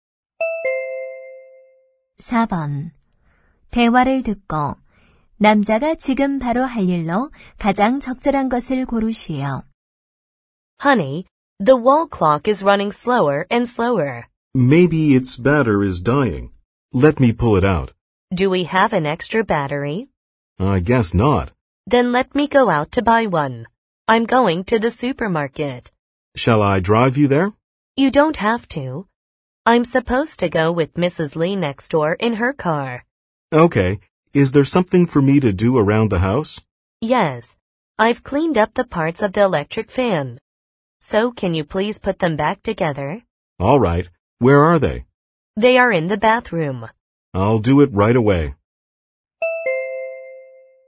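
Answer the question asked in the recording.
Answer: 선풍기 부품 조립하기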